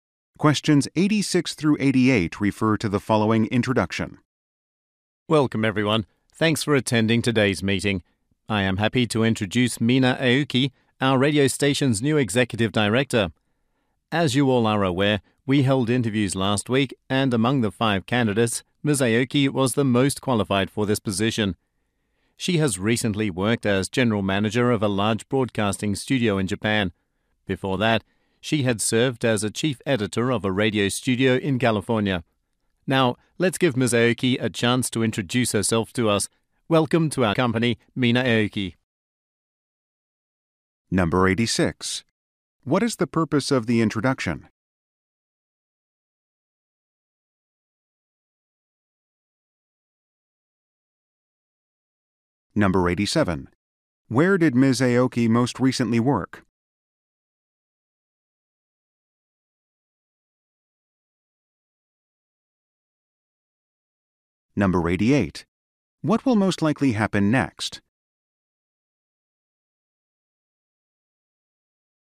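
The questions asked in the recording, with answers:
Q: What is the purpose of the introduction?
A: To introduce the new executive director

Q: Where did Ms. Aoki most recently work?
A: At a large broadcasting studio in Japan

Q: What will most likely happen next?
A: Ms. Aoki will introduce herself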